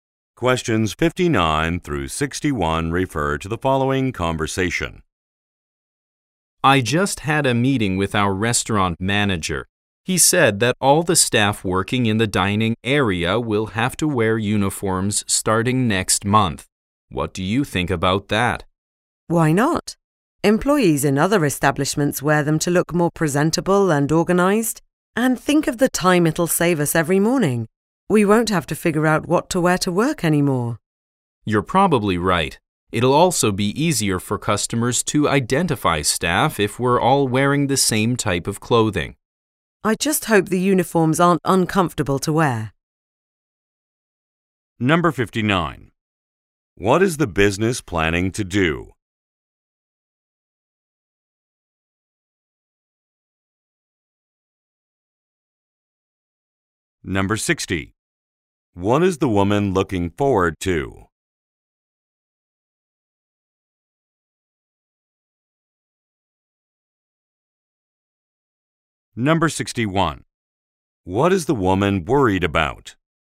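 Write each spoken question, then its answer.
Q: What is the business planning to do?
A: Require dining staff to wear uniforms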